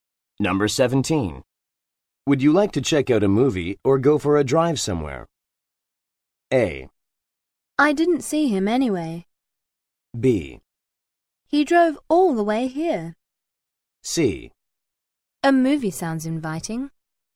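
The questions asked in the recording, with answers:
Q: Would you like to check out a movie or go for a drive somewhere?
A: C: A movie sounds inviting.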